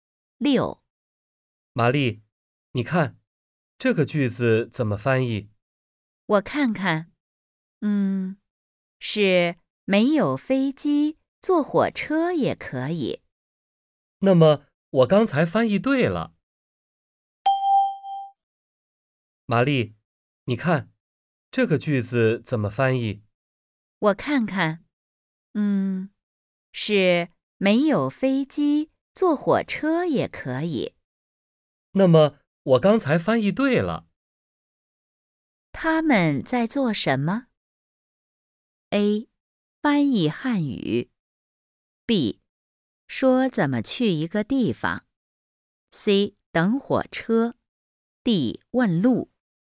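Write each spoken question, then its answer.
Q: 他们在做什么?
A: A: 翻译汉语。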